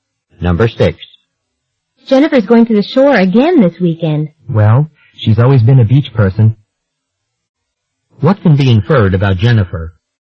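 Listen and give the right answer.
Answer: She likes going to the beach.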